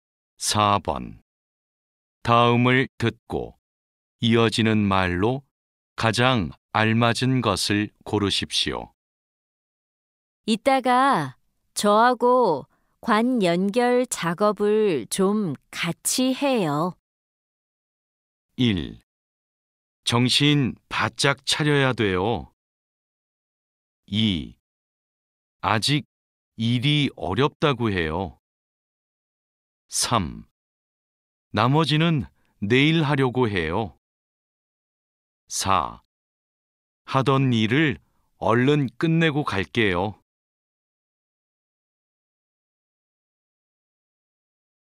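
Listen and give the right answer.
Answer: 4: 하던 일을 얼른 끝내고 갈게요.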